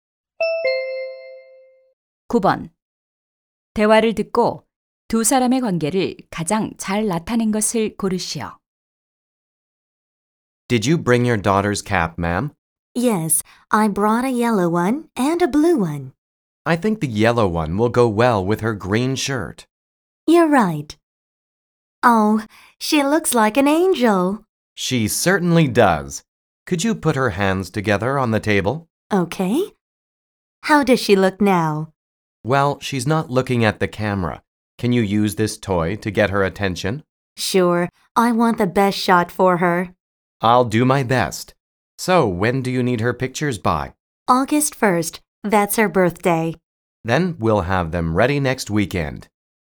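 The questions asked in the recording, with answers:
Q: 대화를 듣고 두 사람의 관계를 가장 잘 나타낸 것을 고르시오.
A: 사진사 - 고객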